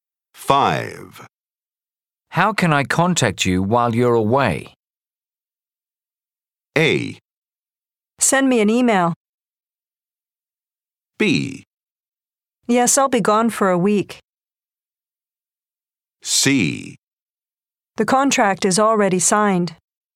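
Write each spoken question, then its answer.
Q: How can I contact you while you're away?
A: A: Send me an email.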